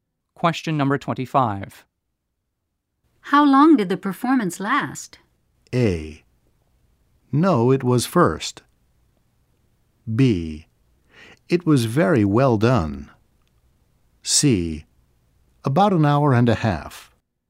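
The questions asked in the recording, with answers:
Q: How long did the performance last?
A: C: About an hour and a half.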